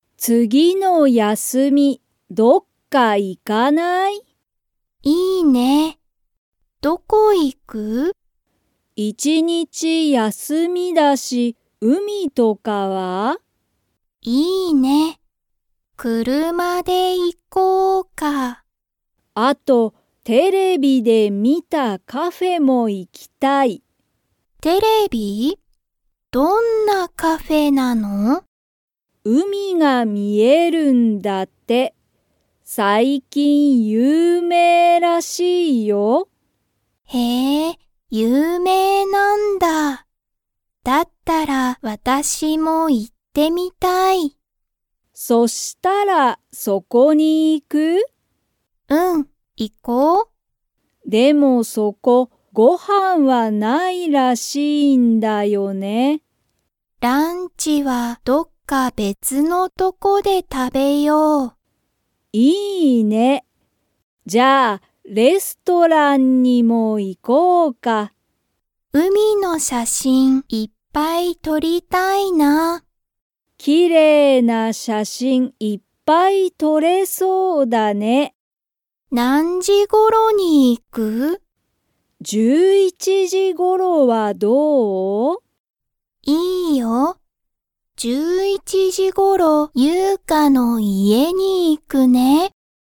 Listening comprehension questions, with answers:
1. ユウカは、____カフェも行(い)きたい。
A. 友達(ともだち)に聞(き)いた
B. テレビで見(み)た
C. 次(つぎ)の休(やす)みも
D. レストランの近(ちか)くの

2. そのカフェは、ご飯(はん)がありますか?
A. はい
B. いいえ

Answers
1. B. テレビで見(み)た
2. B. いいえ

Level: Level 2

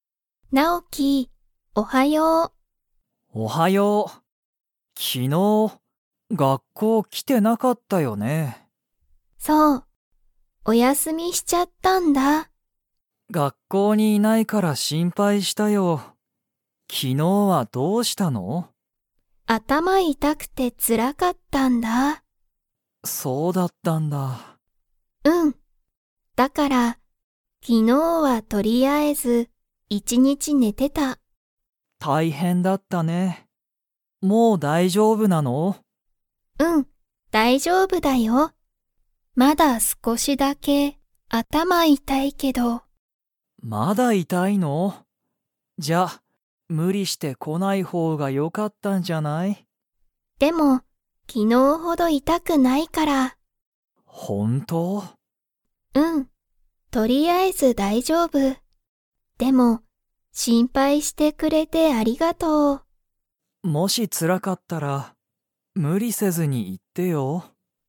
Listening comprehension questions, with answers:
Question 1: 昨日きのう、リカは一日いちにち何なにをしてましたか?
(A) 本ほんを読よんでた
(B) 歌うたってた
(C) テレビを観みてた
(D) 寝ねてた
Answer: (D) 寝ねてた

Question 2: リカは、今日きょうは頭あたまが 。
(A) 少すこし痛いたい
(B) 全まったく痛いたくない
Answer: (A) 少すこし痛いたい

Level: Level 3

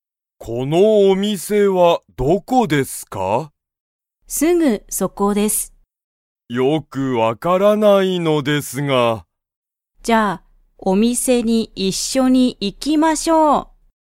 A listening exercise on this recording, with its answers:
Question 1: お店(みせ)は____だ。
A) すぐそこ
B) この上(うえ)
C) 会社(かいしゃ)の前(まえ)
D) 家(いえ)のとこ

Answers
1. A) すぐそこ

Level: Level 1

